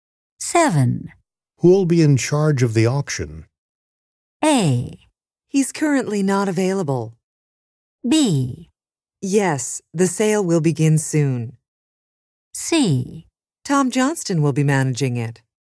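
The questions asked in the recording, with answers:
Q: Who'll be in charge of the auction?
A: C: Tom Johnston will be managing it.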